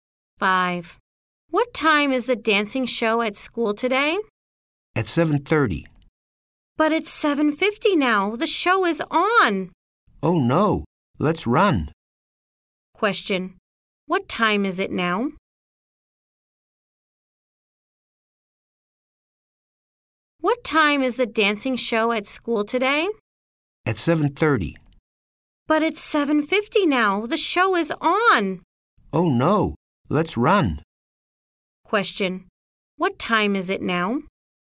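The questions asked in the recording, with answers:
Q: What time is it now?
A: 7:50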